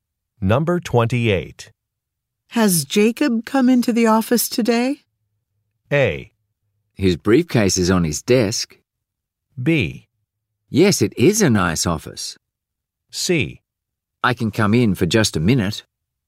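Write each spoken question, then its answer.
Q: Has Jacob come into the office today?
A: A: His briefcase is on his desk.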